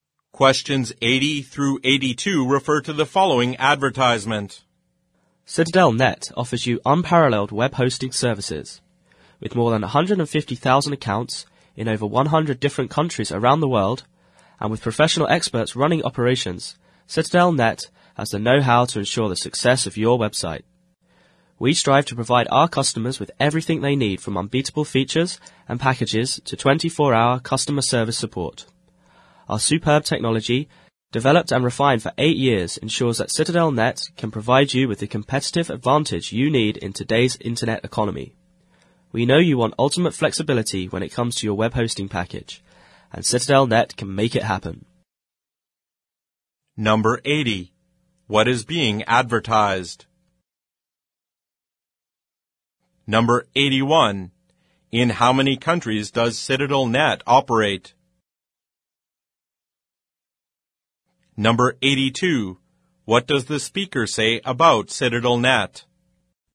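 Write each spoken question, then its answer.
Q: What is being advertised?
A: Web hosting services

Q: In how many countries does CitadelNet operate?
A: Over 100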